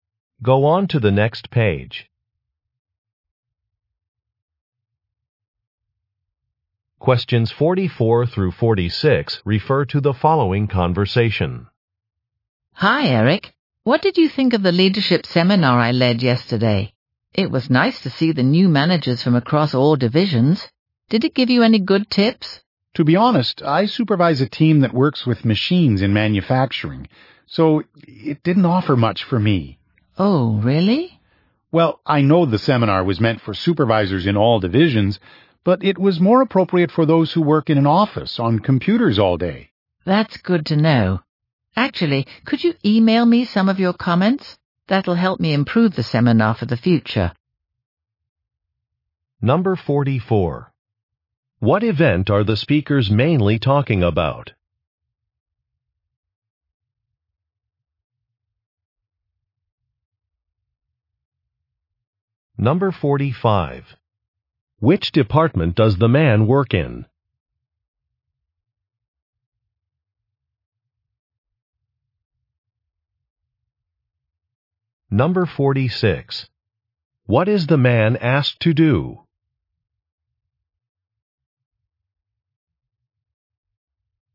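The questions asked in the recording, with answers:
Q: What event are the speakers mainly talking about?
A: A leadership seminar

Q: Which department does the man work in?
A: Manufacturing

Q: What is the man asked to do?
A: Email his comments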